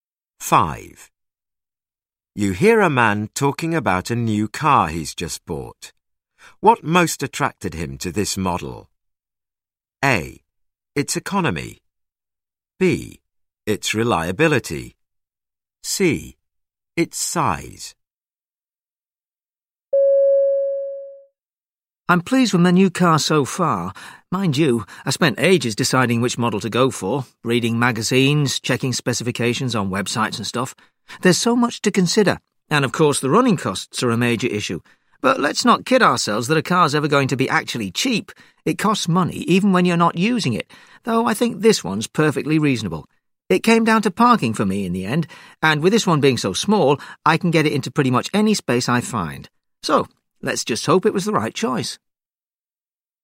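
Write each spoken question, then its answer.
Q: What most attracted him to this model?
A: C: Its size.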